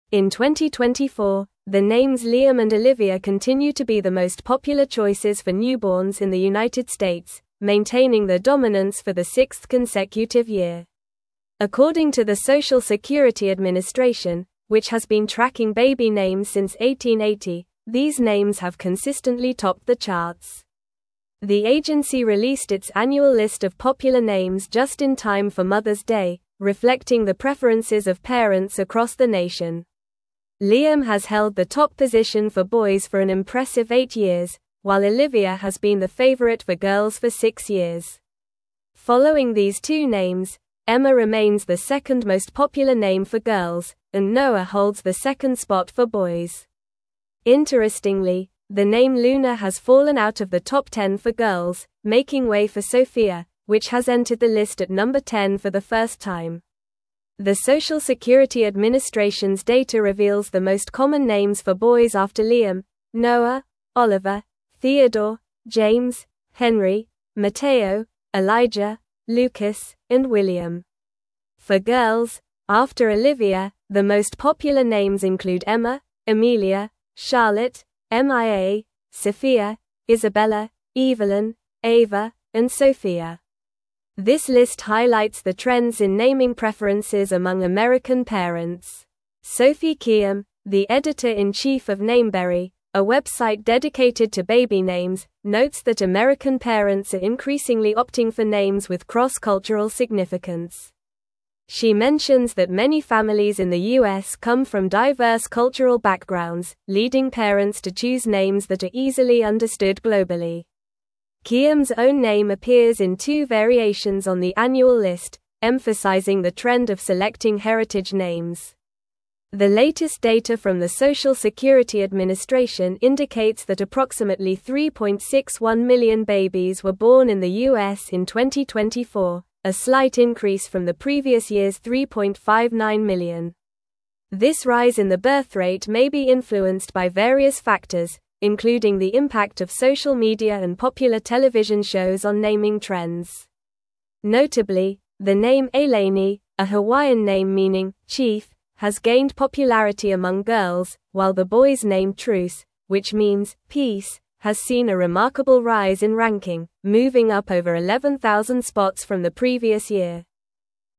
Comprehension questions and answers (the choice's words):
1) In 2024, the names Liam and Olivia (1)______ to be the most popular choices for (2)______ in the United States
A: continue

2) In 2024, the names Liam and Olivia (1)______ to be the most popular choices for (2)______ in the United States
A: newborns

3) The (3)______ released its annual list of popular names just in time for Mother's Day, reflecting the preferences of (4)______ across the nation.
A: agency

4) The (3)______ released its annual list of popular names just in time for Mother's Day, reflecting the preferences of (4)______ across the nation.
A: parents

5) Emma remains the second most (5)______ name for girls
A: popular

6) making way for Sofia, which has (6)______ the list at number 10 for the (7)______ time.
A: entered

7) making way for Sofia, which has (6)______ the list at number 10 for the (7)______ time.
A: first

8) the most popular names include Emma, (8)______, Charlotte, Mia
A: Amelia

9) This list highlights the (9)______s in naming preferences among American parents.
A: trend

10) a website dedicated to baby (10)______, notes that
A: names

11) many (11)______ in the U.S. come from (12)______ cultural backgrounds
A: families

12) many (11)______ in the U.S. come from (12)______ cultural backgrounds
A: diverse

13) including the impact of social (13)______ and popular television shows on naming trends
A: media

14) the name Ailany, a (14)______ name (15)______ "chief,"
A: Hawaiian

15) the name Ailany, a (14)______ name (15)______ "chief,"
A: meaning

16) moving up over 11,000 (16)______ from the previous year.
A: spots

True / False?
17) Approximately 3.61 million babies were born in the U.S. in 2024.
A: True

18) The Social Security Administration has not been tracking baby names since 1880.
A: False

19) Liam has been the top name for girls for eight consecutive years.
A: False

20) In 2024, Liam and Olivia are the most popular names for newborns in the United States.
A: True

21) Olivia has been the favorite name for girls for six consecutive years.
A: True

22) Emma is the third most popular name for girls, while Noah is the second for boys.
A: False

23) The name Ailany has not gained popularity among girls, while the boys' name Truce has not risen significantly in ranking.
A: False

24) The name Sofia has entered the Top 10 for girls for the first time in 2024.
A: True

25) What are the most popular names for newborns in the United States in 2024?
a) Noah and Emma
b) Sophia and James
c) Liam and Olivia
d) Charlotte and Mateo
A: Liam and Olivia

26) How long has Liam been the top name for boys?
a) Eight years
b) Six years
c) Five years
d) Ten years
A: Eight years

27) Which name has fallen out of the Top 10 for girls?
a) Emma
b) Luna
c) Ava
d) Mia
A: Luna

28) What name has entered the list at number 10 for girls for the first time?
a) Amelia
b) Evelyn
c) Sofia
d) Charlotte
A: Sofia

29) Who is Sophie Kihm?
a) A baby name consultant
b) A social media influencer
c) A popular television host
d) The editor-in-chief of Nameberry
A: The editor-in-chief of Nameberry

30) How many babies were born in the U.S. in 2024 according to the Social Security Administration?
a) Approximately 3.59 million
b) Approximately 3.61 million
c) Approximately 3.70 million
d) Approximately 3.50 million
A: Approximately 3.61 million

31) What is the meaning of the name Ailany?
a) Chief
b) Peace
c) Happiness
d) Strong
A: Chief

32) What significant change occurred with the boys' name Truce?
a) It fell out of the Top 10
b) It became the most popular name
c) It was introduced as a new name for boys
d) It moved up over 11,000 spots in ranking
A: It moved up over 11,000 spots in ranking

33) What names have been the most popular choices for newborns in the United States in 2024?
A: Liam and Olivia.

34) How long has Liam been the top name for boys, and how long has Olivia been the favorite for girls?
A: Liam has been the top name for boys for eight years, and Olivia has been the favorite for girls for six years.

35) Which name has entered the Top 10 for girls for the first time, and which name has fallen out of it?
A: Sofia has entered the Top 10 for girls for the first time, and Luna has fallen out of it.

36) What are the names that follow Liam in popularity for boys according to the Social Security Administration?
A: Noah, Oliver, Theodore, James, Henry, Mateo, Elijah, Lucas, and William.

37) What factors might have contributed to the slight increase in the birthrate in the U.S. in 2024?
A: Factors may include the impact of social media and popular television shows on naming trends.

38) Can you name one Hawaiian name that has gained popularity among girls and its meaning?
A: Ailany, which means "chief."

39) What significant change occurred with the boys' name Truce in terms of its ranking from the previous year?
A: Truce has seen a remarkable rise in ranking, moving up over 11,000 spots from the previous year.

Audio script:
In 2024, the names Liam and Olivia continue to be the most popular choices for newborns in the United States, maintaining their dominance for the sixth consecutive year. According to the Social Security Administration, which has been tracking baby names since 1880, these names have consistently topped the charts. The agency released its annual list of popular names just in time for Mother's Day, reflecting the preferences of parents across the nation.
Liam has held the top position for boys for an impressive eight years, while Olivia has been the favorite for girls for six years. Following these two names, Emma remains the second most popular name for girls, and Noah holds the second spot for boys. Interestingly, the name Luna has fallen out of the Top 10 for girls, making way for Sofia, which has entered the list at number 10 for the first time.
The Social Security Administration's data reveals the most common names for boys after Liam: Noah, Oliver, Theodore, James, Henry, Mateo, Elijah, Lucas, and William. For girls, after Olivia, the most popular names include Emma, Amelia, Charlotte, Mia, Sophia, Isabella, Evelyn, Ava, and Sofia. This list highlights the trends in naming preferences among American parents.
Sophie Kihm, the editor-in-chief of Nameberry, a website dedicated to baby names, notes that American parents are increasingly opting for names with cross-cultural significance. She mentions that many families in the U.S. come from diverse cultural backgrounds, leading parents to choose names that are easily understood globally. Kihm's own name appears in two variations on the annual list, emphasizing the trend of selecting heritage names.
The latest data from the Social Security Administration indicates that approximately 3.61 million babies were born in the U.S. in 2024, a slight increase from the previous year's 3.59 million. This rise in the birthrate may be influenced by various factors, including the impact of social media and popular television shows on naming trends. Notably, the name Ailany, a Hawaiian name meaning "chief," has gained popularity among girls, while the boys' name Truce, which means "peace," has seen a remarkable rise in ranking, moving up over 11,000 spots from the previous year.

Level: Level 4